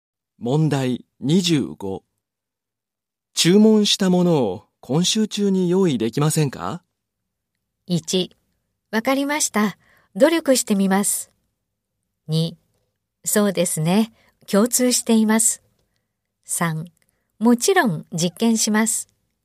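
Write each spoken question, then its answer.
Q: 注文したものを今週中に用意できませんか?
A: 1: わかりました。努力してみます。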